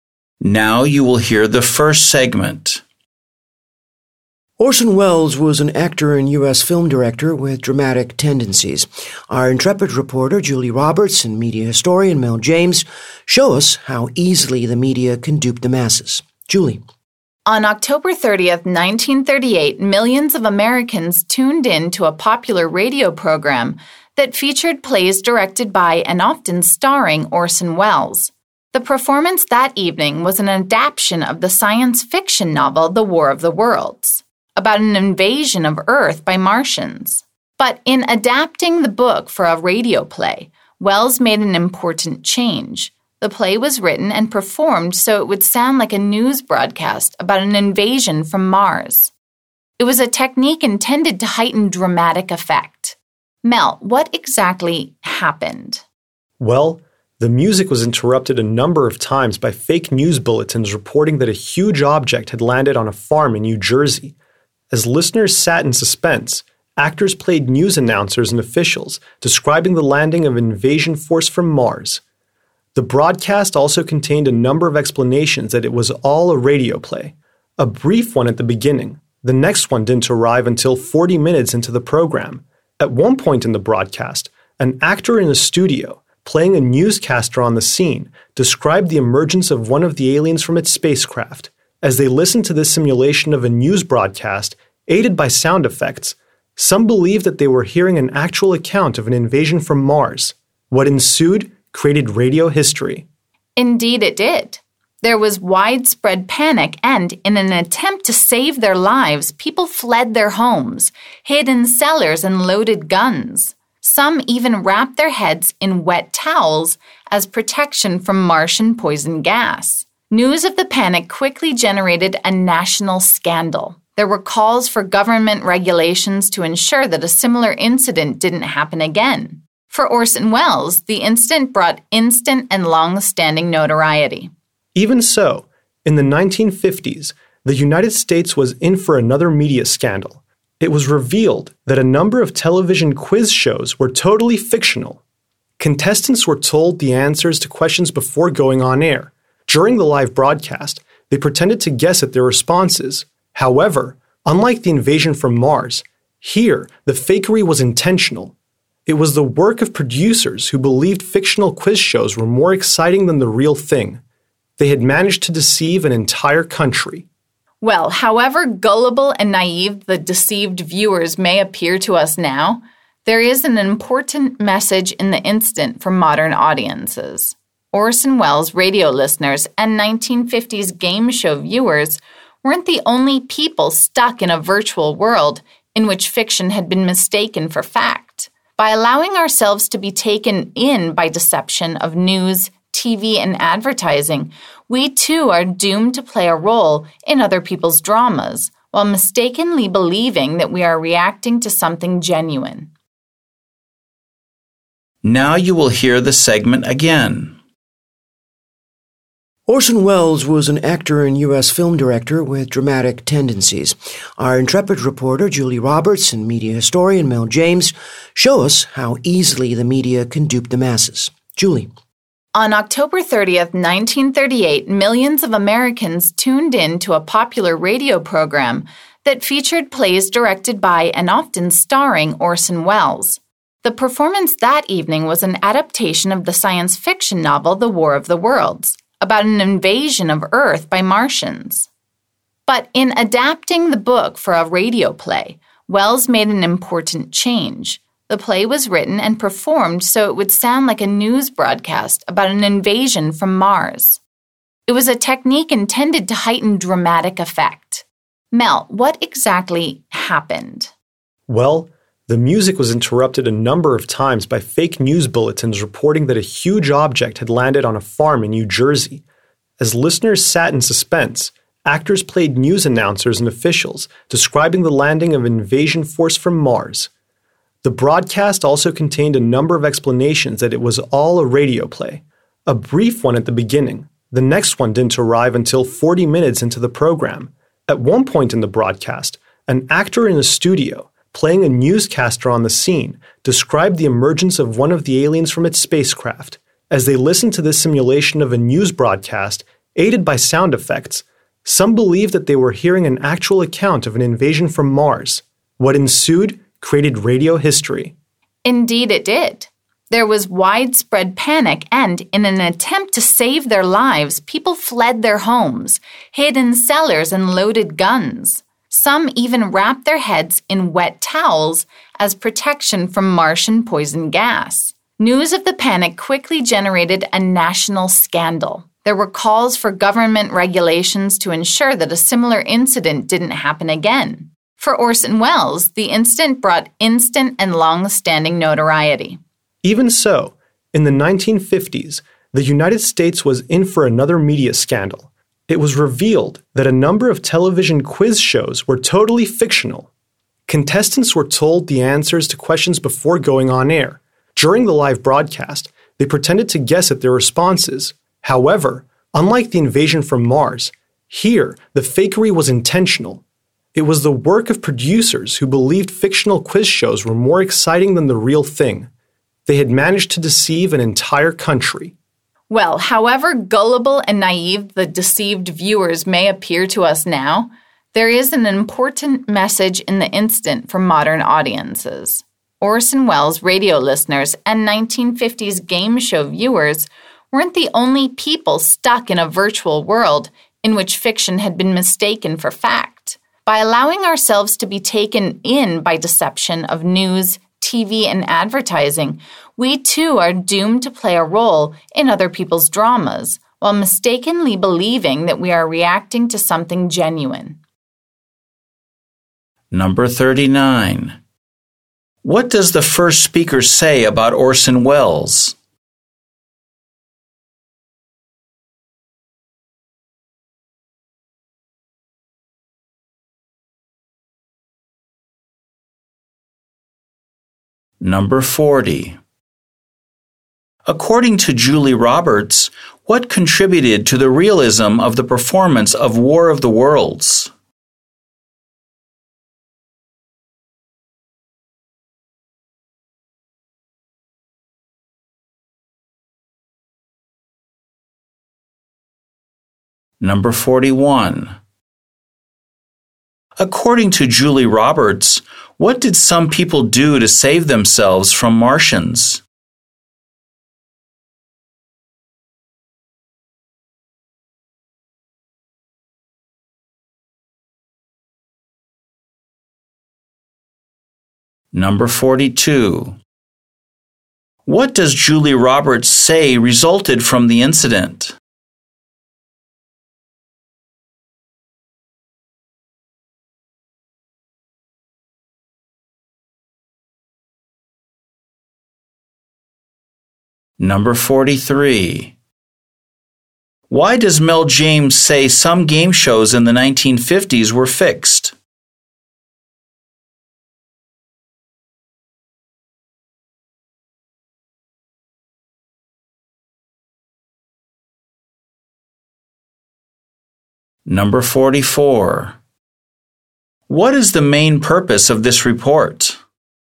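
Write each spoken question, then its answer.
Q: What does the first speaker say about Orson Welles?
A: He was an actor and U.S. film director with dramatic tendencies

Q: According to Julie Roberts, what contributed to the realism of the performance of War of the Worlds?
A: It was performed like a news broadcast, with fake news bulletins and sound effects

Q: According to Julie Roberts, what did some people do to save themselves from Martians?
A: They fled their homes, hid in cellars, loaded guns and wrapped their heads in wet towels

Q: What does Julie Roberts say resulted from the incident?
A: A national scandal, with calls for government regulation

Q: Why does Mel James say some game shows in the 1950s were fixed?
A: Producers believed fictional quiz shows were more exciting than real ones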